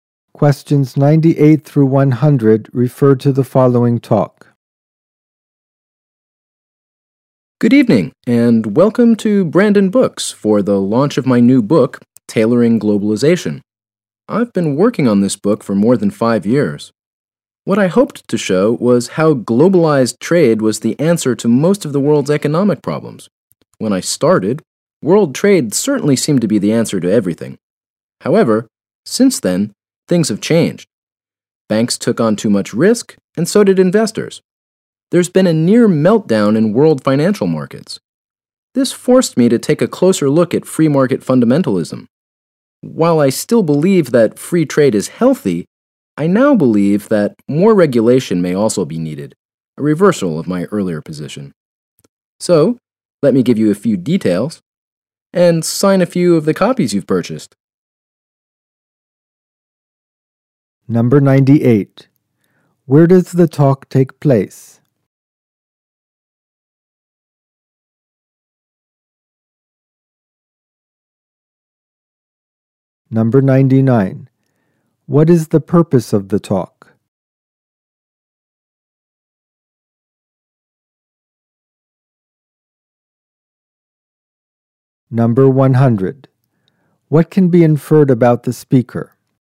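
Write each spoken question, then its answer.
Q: Where does the talk take place?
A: At a bookstore (Brandon Books)

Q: What is the purpose of the talk?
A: To launch the speaker's new book

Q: What can be inferred about the speaker?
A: He has changed his view and now thinks more regulation may be needed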